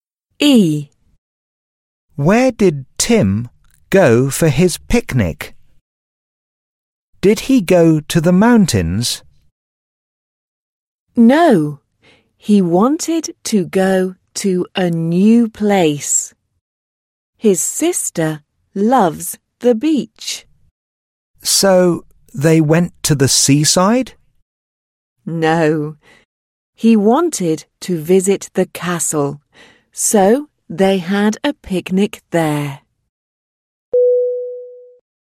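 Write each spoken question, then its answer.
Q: Where did Tim go for his picnic?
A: To the castle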